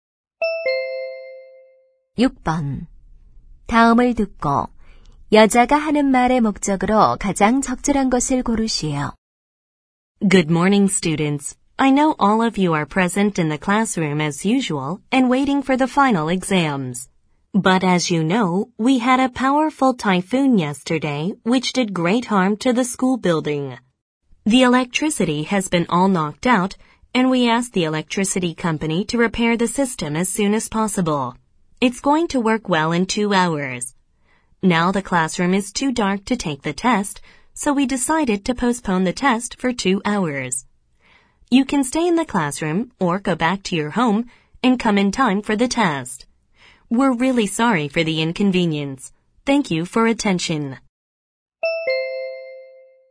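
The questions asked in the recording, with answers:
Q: 다음을 듣고 여자가 하는 말의 목적으로 가장 적절한 것을 고르시오.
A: 시험이 2시간 연기됨을 알리려고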